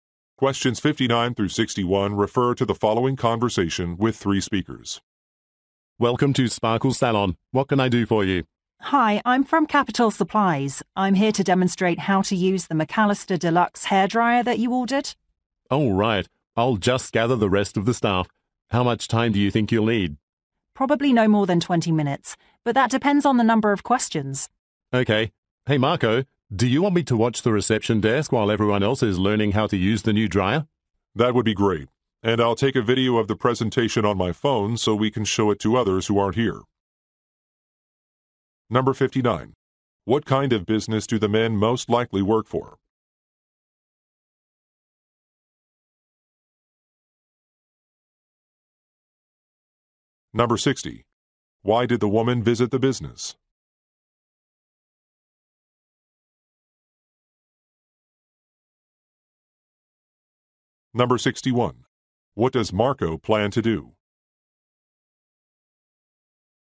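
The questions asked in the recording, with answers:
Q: What kind of business do the men most likely work for?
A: A hair salon

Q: Why did the woman visit the business?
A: To demonstrate a hairdryer

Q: What does Marco plan to do?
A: Record the presentation on his phone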